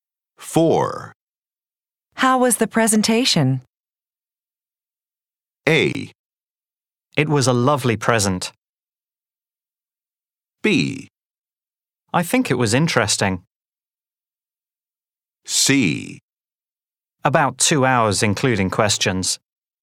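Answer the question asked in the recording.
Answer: B: I think it was interesting.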